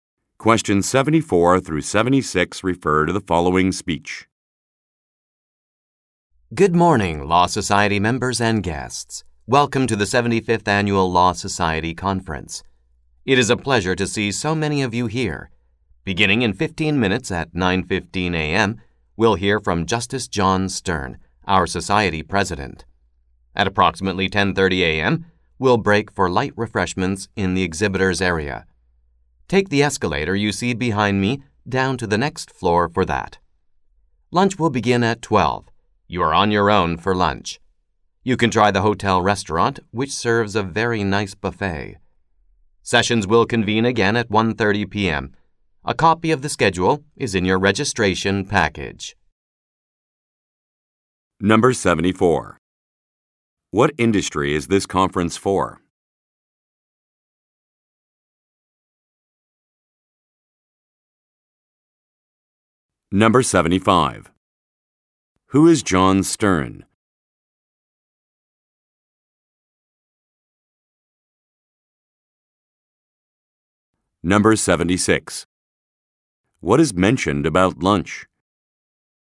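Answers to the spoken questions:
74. Law
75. The society president (a justice)
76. Attendees are on their own for lunch; it begins at 12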